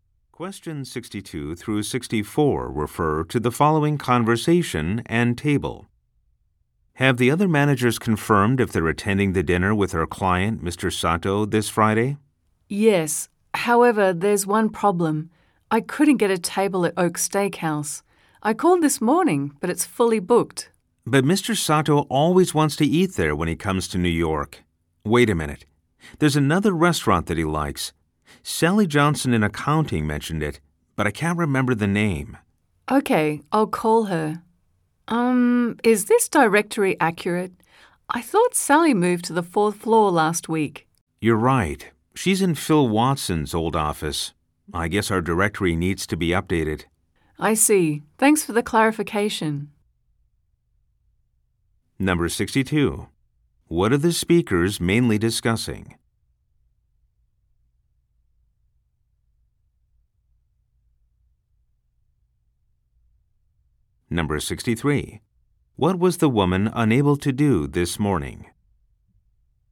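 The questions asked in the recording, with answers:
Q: What are the speakers mainly discussing?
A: A dinner with a client, Mr. Sato

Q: What was the woman unable to do this morning?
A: Reserve a table at Oak Steakhouse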